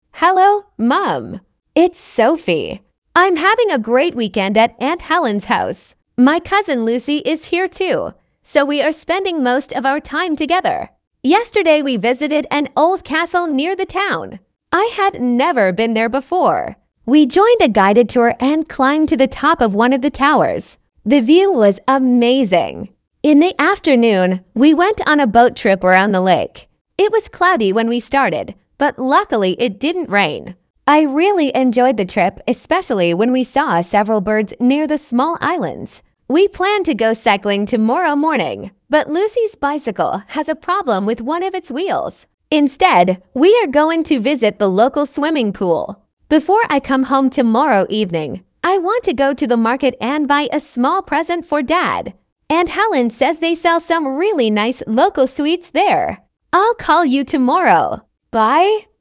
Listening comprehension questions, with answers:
Прослушайте текст и определите, какие из приведённых утверждений A–E соответствуют содержанию текста — 1 (Right), а какие не соответствуют — 2 (False). Вы услышите текст дважды.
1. Sophie is spending the weekend with her cousin.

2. Sophie has already visited the old castle.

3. Sophie did not enjoy the boat trip because of the weather.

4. Sophie is going cycling tomorrow morning.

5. Sophie plans to buy a present before going home.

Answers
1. Right
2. False
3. False
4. False
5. Right

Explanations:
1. Софи говорит, что проводит выходные вместе со своей двоюродной сестрой Люси.
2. До этой поездки Софи никогда не была в старом замке: I had never been there before.
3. Несмотря на облачную погоду, дождя не было, и Софи говорит, что ей очень понравилась прогулка на лодке.
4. Софи и Люси планировали покататься на велосипедах, но из-за проблемы с велосипедом решили пойти в бассейн.
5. Перед возвращением домой Софи собирается купить подарок для папы.

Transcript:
It's Sophie. I'm having a great weekend at Aunt Helen's house. My cousin Lucy is here too, so we are spending most of our time together.
Yesterday we visited an old castle near the town. I had never been there before. We joined a guided tour and climbed to the top of one of the towers. The view was amazing.
In the afternoon, we went on a boat trip around the lake. It was cloudy when we started, but luckily it didn't rain. I really enjoyed the trip, especially when we saw several birds near the small islands.
We planned to go cycling tomorrow morning, but Lucy's bicycle has a problem with one of its wheels. Instead, we are going to visit the local swimming pool.
Before I come home tomorrow evening, I want to go to the market and buy a small present for Dad. Aunt Helen says they sell some really nice local sweets there.
I'll call you tomorrow. Bye!